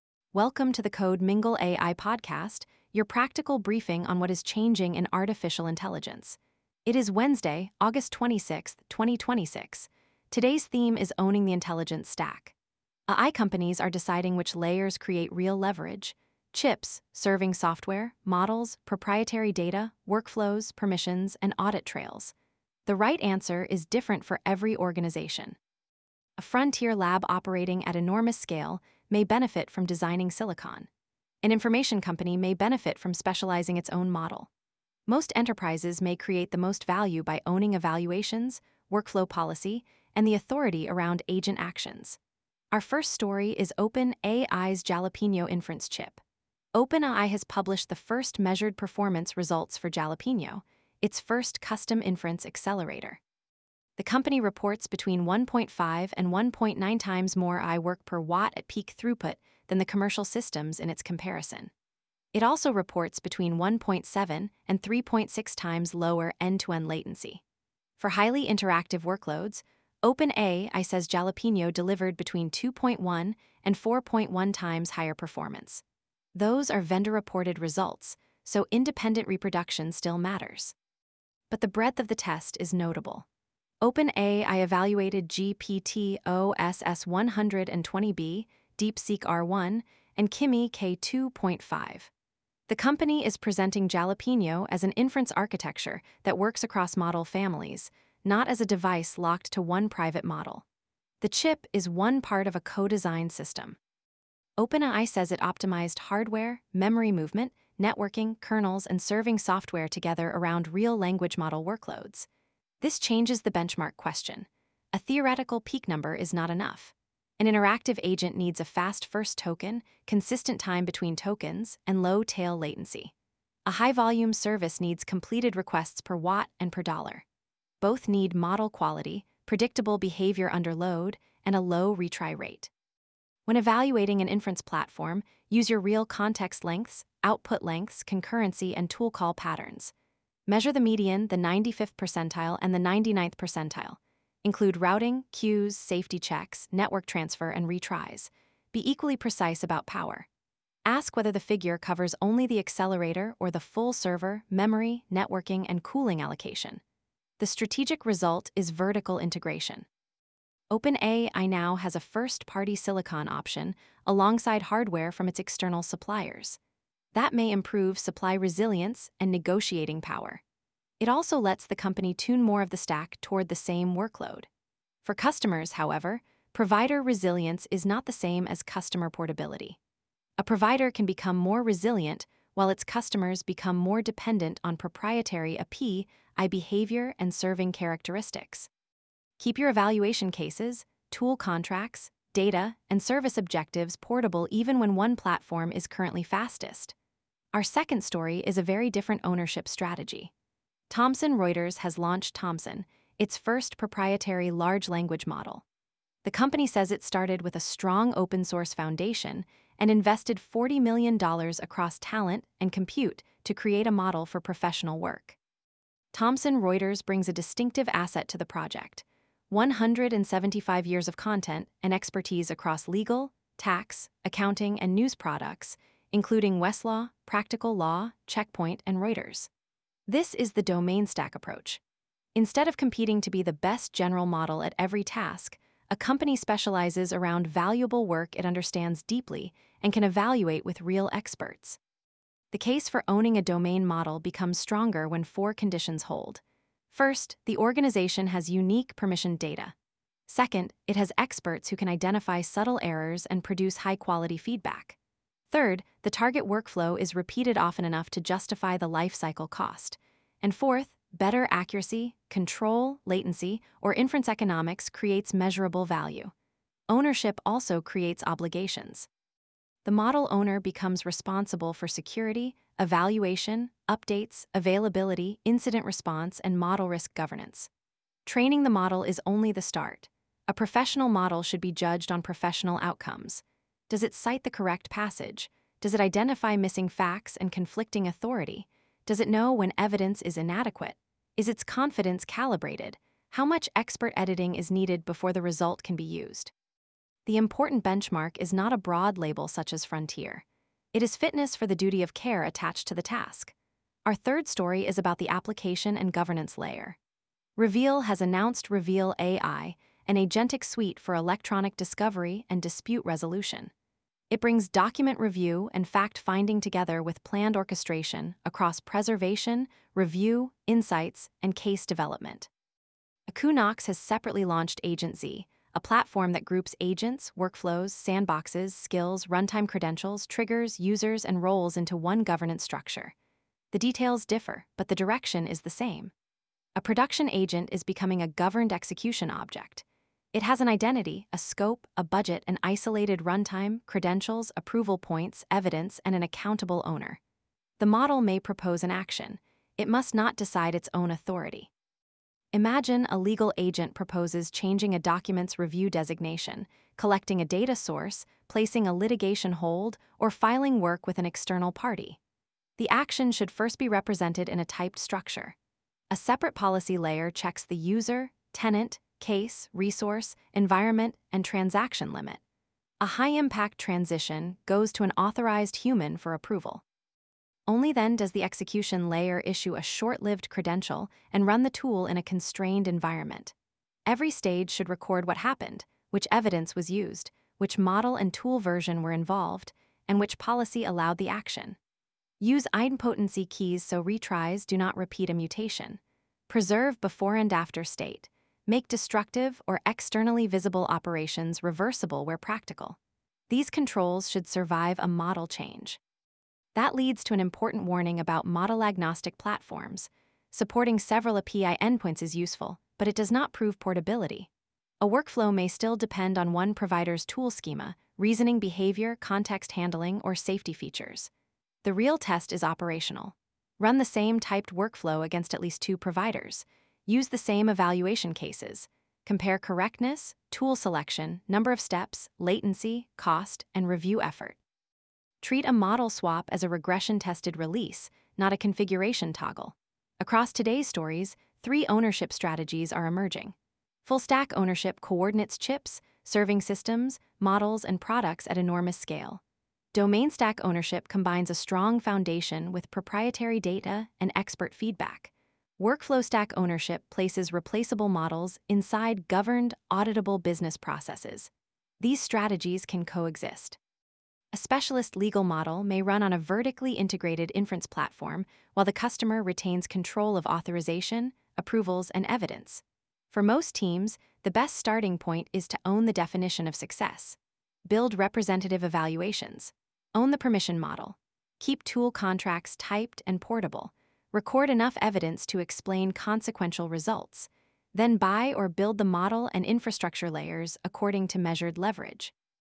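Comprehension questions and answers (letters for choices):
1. What breadth claim did OpenAI make for Jalapeño's measured tests?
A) It was tested only on a private OpenAI model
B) It was tested across GPT-OSS, DeepSeek, and Kimi model families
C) It was tested only for model training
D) It was tested without measuring latency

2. What foundation did Thomson Reuters say it used to build Thomson?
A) A strong open-source model foundation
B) A spreadsheet macro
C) A custom inference chip only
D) A consumer search index with no specialization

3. Which layer should decide whether an agent is authorized to perform a consequential action?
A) The model's conversational confidence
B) A deterministic policy and approval layer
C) The longest available prompt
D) The chip scheduler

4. Why should inference benchmarks include tail latency and retries?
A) They reveal system behavior and completed-task cost under realistic load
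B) They make model quality irrelevant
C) They eliminate the need to define a power boundary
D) They guarantee portability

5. What is the strongest way to validate a model-agnostic agent-platform claim?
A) Count the provider logos on its website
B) Run the same typed workflow and regression suite against multiple providers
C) Use an unversioned prompt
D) Let each model invent a different tool schema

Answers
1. B
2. A
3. B
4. A
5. B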